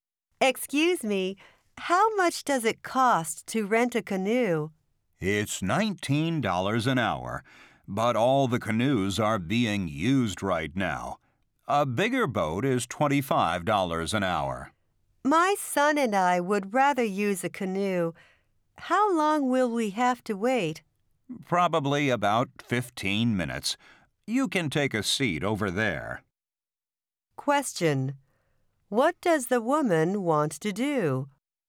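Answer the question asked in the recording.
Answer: Rent a canoe with her son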